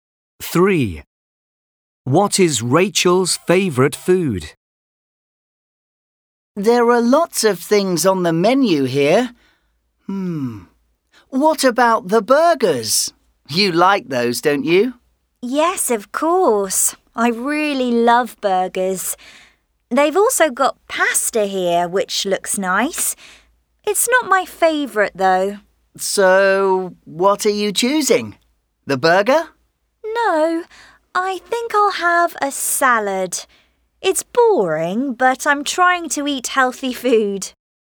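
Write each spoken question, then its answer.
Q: What is Rachel's favourite food?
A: Burgers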